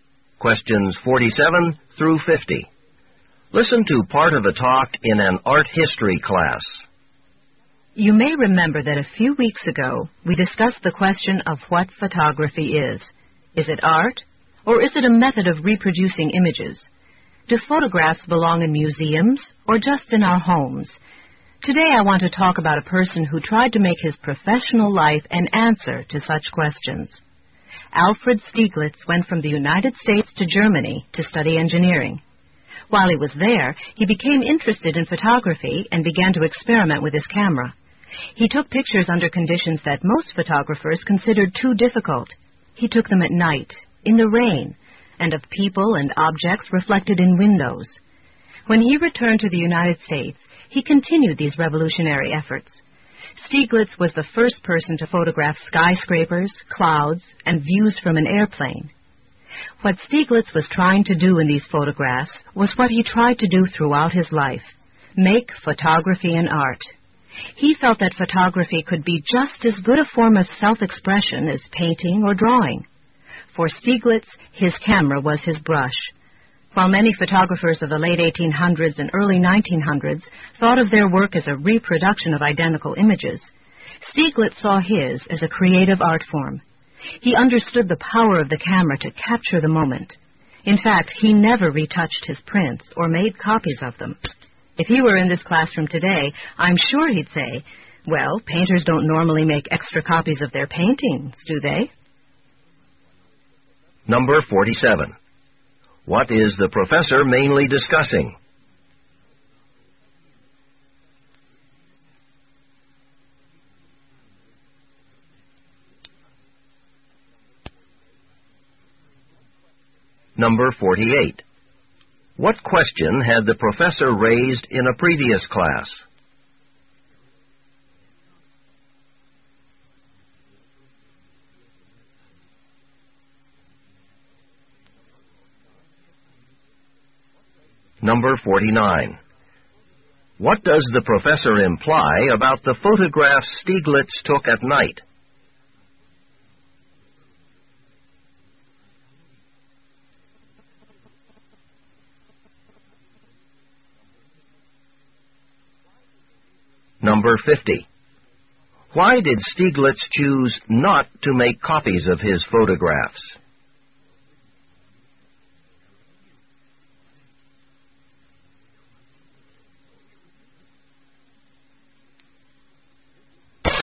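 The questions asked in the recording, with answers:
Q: What is the professor mainly discussing?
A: Alfred Stieglitz's efforts to make photography an art

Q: What question had the professor raised in a previous class?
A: Whether photography is art or a method of reproducing images

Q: What does the professor imply about the photographs Stieglitz took at night?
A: They were taken under conditions most photographers considered too difficult

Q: Why did Stieglitz choose not to make copies of his photographs?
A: He saw each photograph as a unique work of art, like a painting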